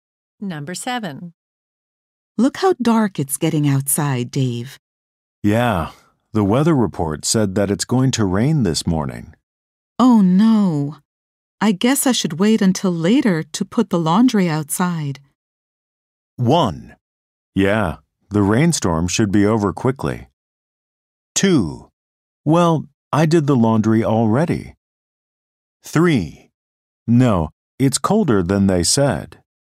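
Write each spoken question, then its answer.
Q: Oh no. I guess I should wait until later to put the laundry outside.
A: 1: Yeah, the rainstorm should be over quickly.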